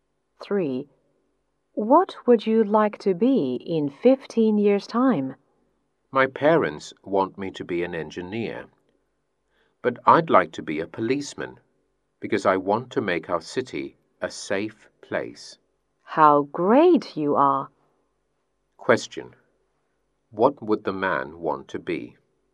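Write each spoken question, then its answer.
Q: What would the man want to be?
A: A policeman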